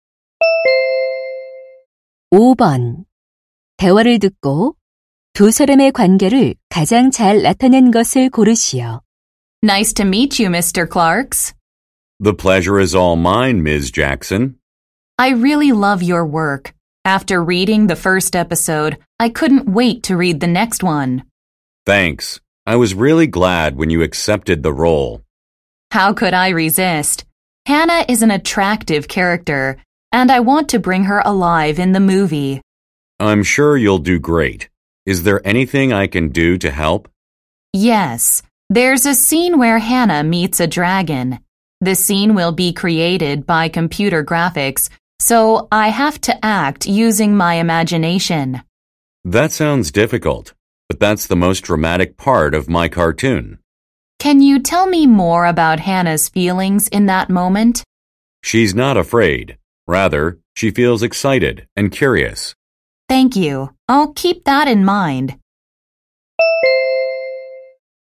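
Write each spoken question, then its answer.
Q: 대화를 듣고 두 사람의 관계를 가장 잘 나타낸 것을 고르시오.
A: 만화가 – 배우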